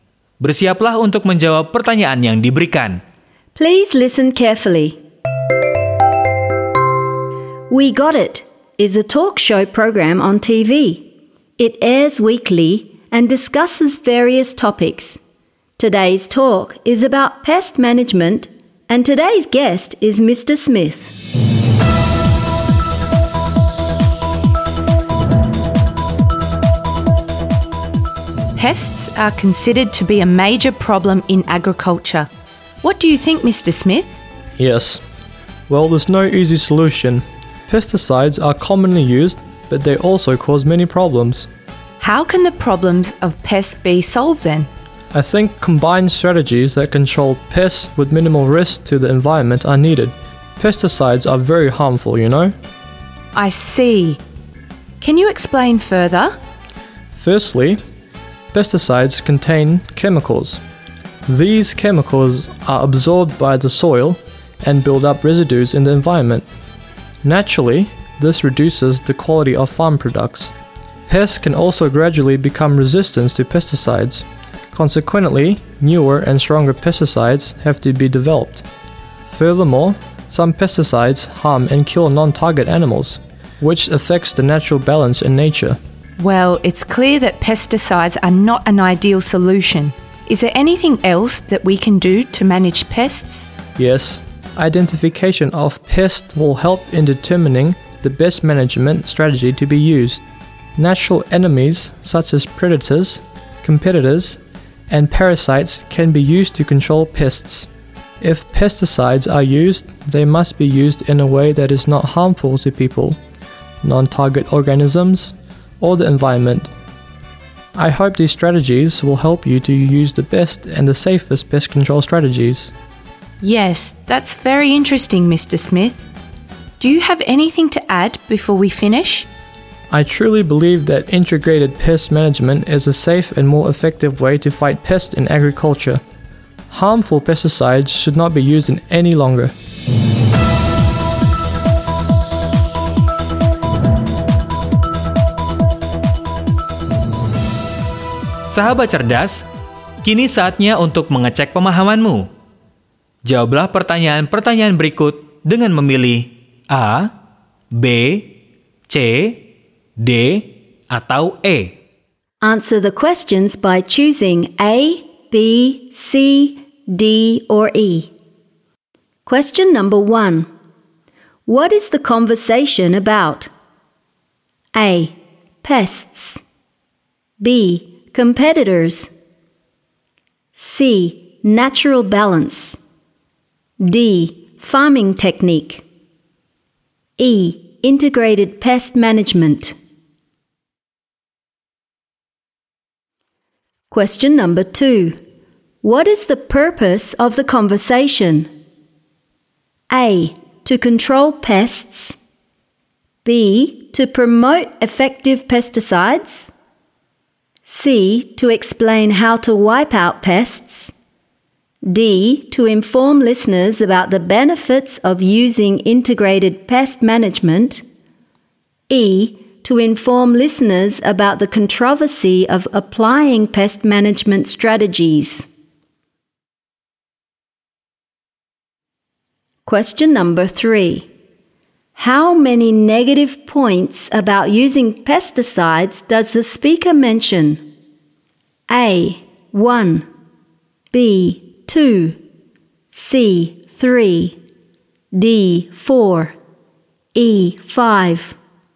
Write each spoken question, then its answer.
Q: What is the conversation about?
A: E. Integrated pest management.

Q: What is the purpose of the conversation?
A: D. To inform listeners about the benefits of using integrated pest management.

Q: How many negative points about using pesticides does the speaker mention?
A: C. 3.